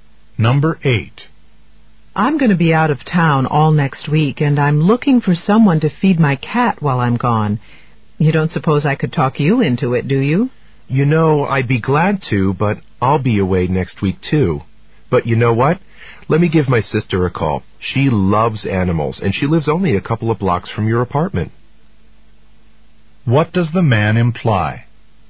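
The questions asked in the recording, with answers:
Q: What does the man imply?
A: His sister might feed the cat.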